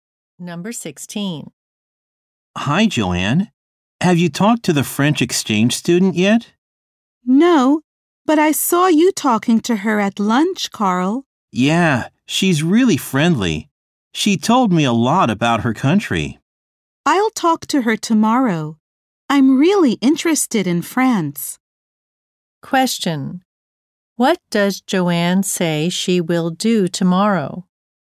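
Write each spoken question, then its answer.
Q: What does Joanne say she will do tomorrow?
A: Talk to the French exchange student.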